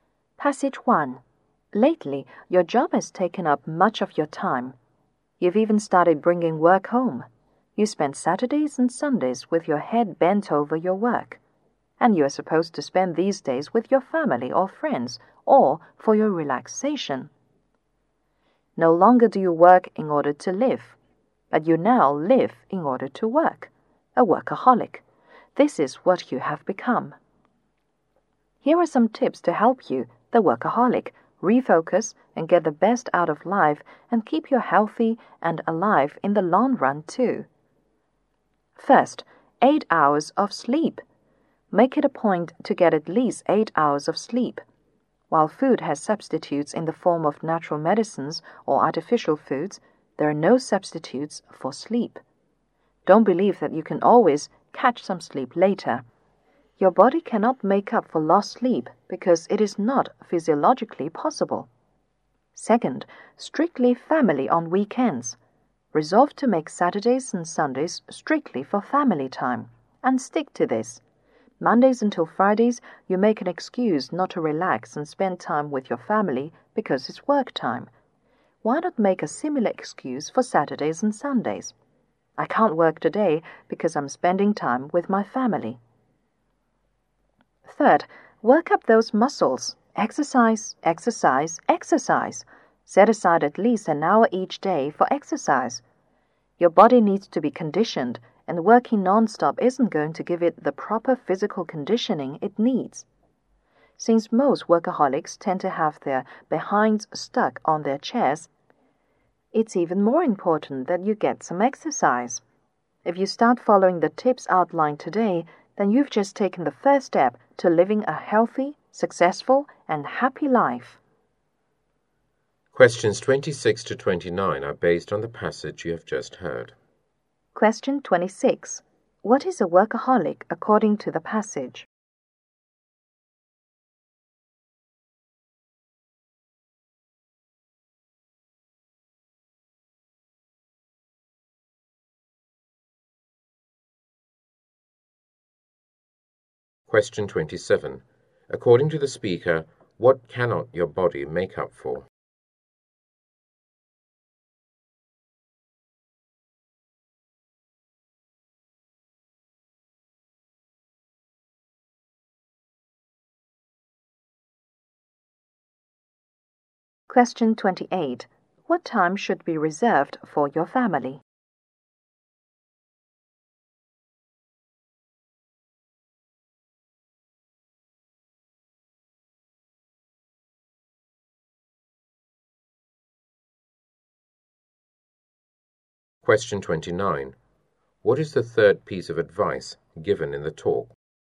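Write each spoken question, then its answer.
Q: What is a workaholic according to the passage?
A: Someone who lives in order to work.

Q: According to the speaker, what cannot your body make up for?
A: Lost sleep.

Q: What time should be reserved for your family?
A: Saturdays and Sundays (weekends).

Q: What is the third piece of advice given in the talk?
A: Exercise at least an hour each day.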